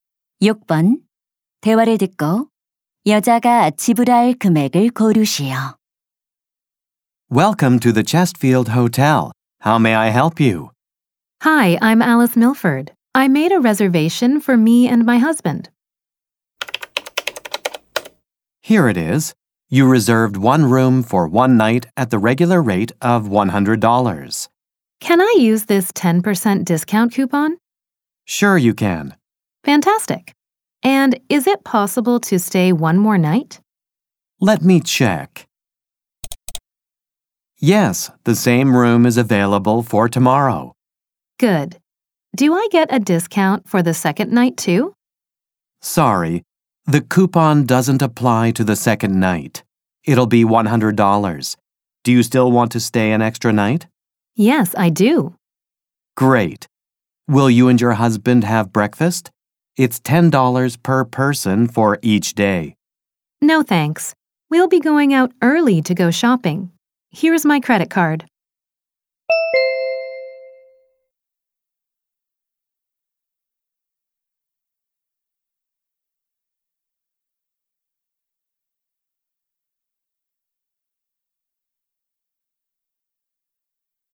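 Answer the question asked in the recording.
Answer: 190달러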